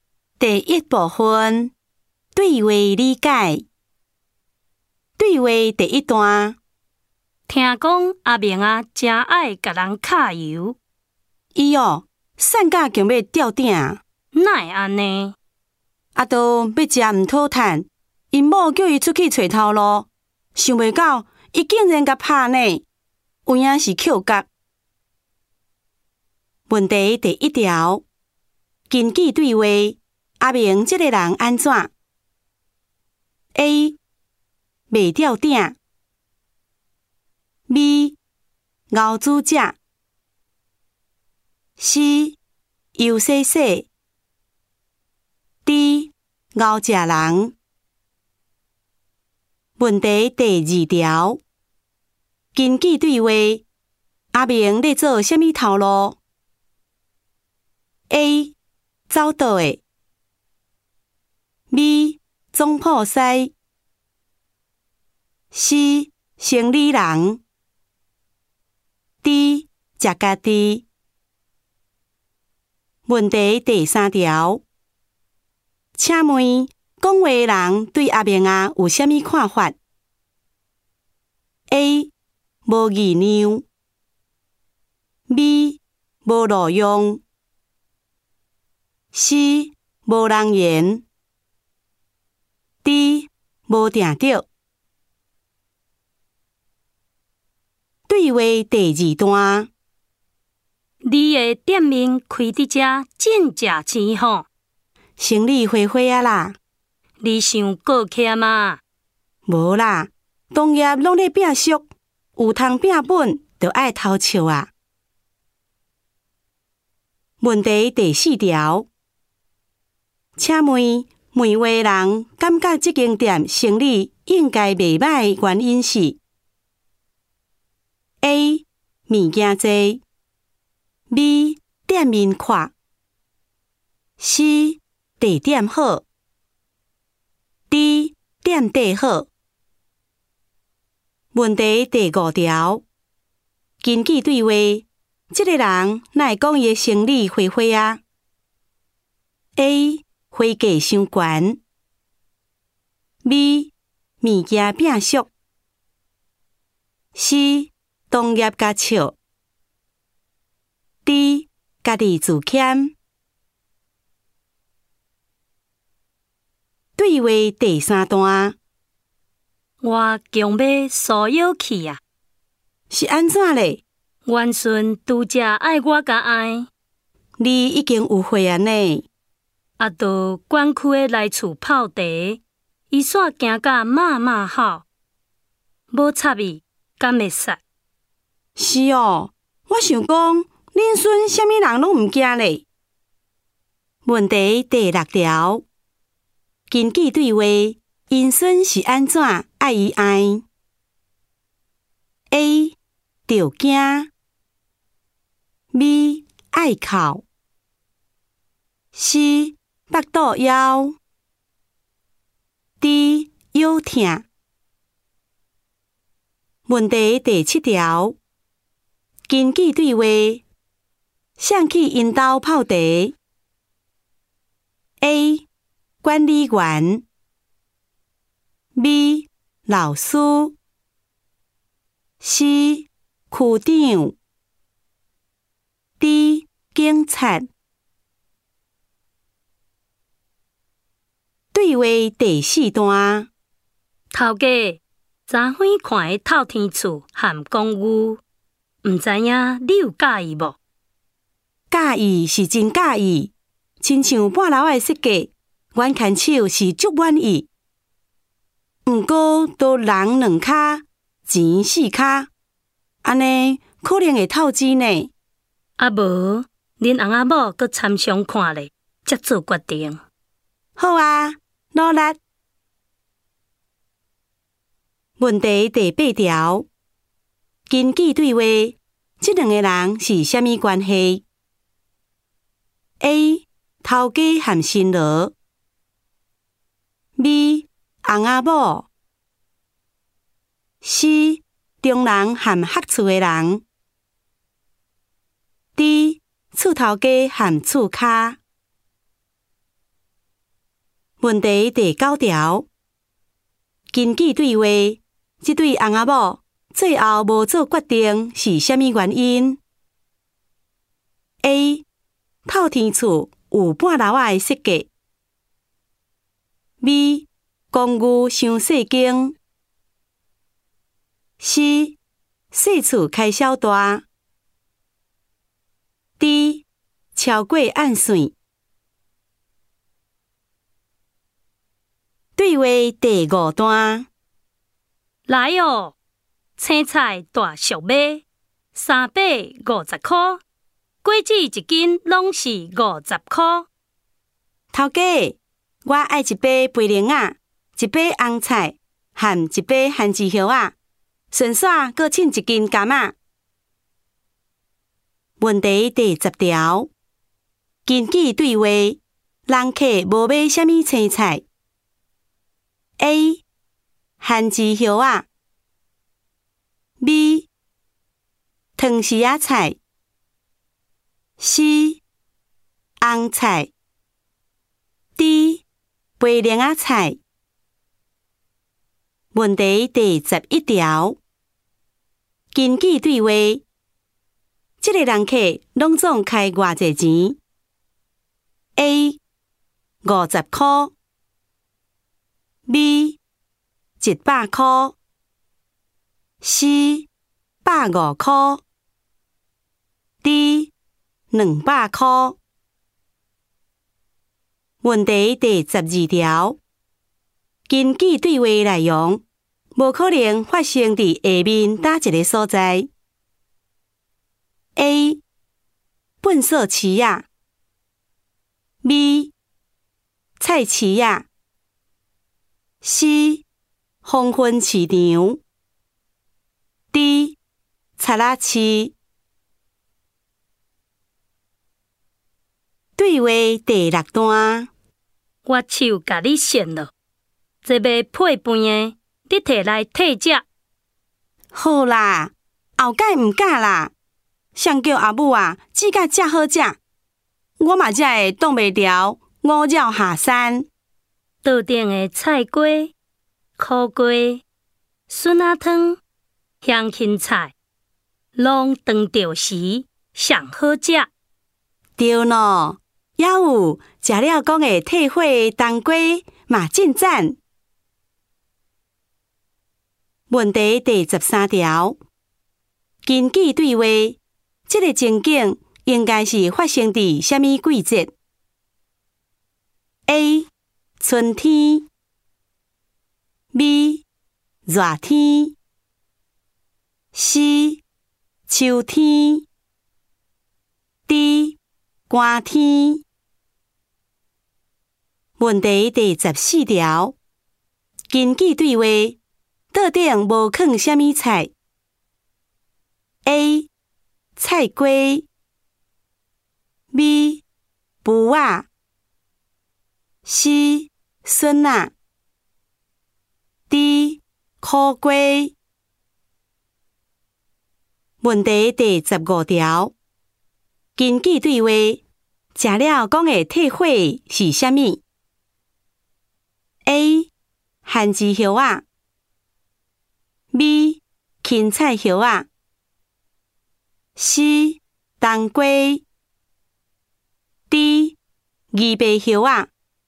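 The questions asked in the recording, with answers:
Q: 请问讲话的人对阿明啊有什么看法 ?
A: B: 无路用

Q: 请问问话人感觉这间店生意应该袂歹,原因是 ?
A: C: 地点好

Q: 根据对话,因孙是安怎爱伊爱 ?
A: A: 着惊

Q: 根据对话,这对翁阿母最后无做决定是虾米原因 ?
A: D: 超过按算

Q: 根据对话,人客无买什么青菜。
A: B: 藤丝仔菜

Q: 根据对话内容,无可能发生伫下面哪一个所在 ?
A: A: 粪扫池啊

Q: 根据对话,这个情景应该是发生伫什么季节 ?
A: B: 热天

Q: 根据对话,吃了说的退火是什么?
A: C: 冬瓜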